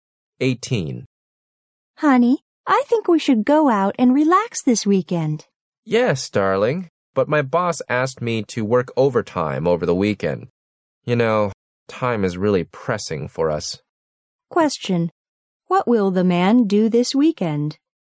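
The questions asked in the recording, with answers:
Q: What will the man do this weekend?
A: Work overtime.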